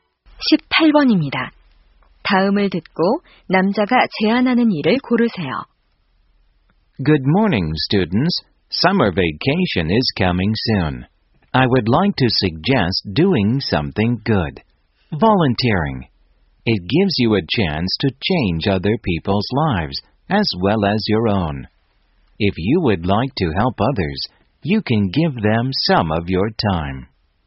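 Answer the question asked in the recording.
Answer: 자원봉사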